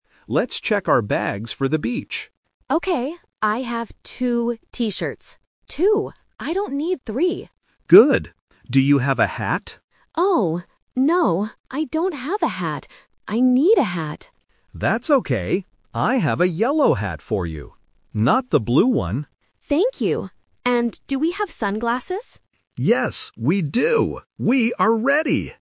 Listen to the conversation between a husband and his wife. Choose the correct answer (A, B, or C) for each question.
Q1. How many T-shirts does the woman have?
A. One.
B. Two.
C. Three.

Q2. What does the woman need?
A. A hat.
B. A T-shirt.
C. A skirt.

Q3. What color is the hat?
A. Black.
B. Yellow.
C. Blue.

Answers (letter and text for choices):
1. B. Two.
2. A. A hat.
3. B. Yellow.

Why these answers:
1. The woman clearly says, "I have two T-shirts. Two." Option C (Three) is the trap because she mentions the number three, but says she doesn't need three. Option A is not mentioned.
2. When asked about a hat, the woman says, "Oh, no. I don't have a hat. I need a hat." Option B (A T-shirt) is the trap because she already has them, she doesn't need to find one. Option C is not mentioned in the audio.
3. The man offers his hat by saying, "I have a yellow hat for you." Option C (Blue) is the trap because the man mentions it, but immediately rejects it by saying "Not the blue one." Option A is not mentioned.

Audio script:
Man: Let's check our bags for the beach.
Woman: Okay. I have two T-shirts. Two. I don't need three.
Man: Good. Do you have a hat?
Woman: Oh, no. I don't have a hat. I need a hat.
Man: That's okay. I have a yellow hat for you. Not the blue one.
Woman: Thank you! And do we have sunglasses?
Man: Yes, we do. We are ready!

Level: A1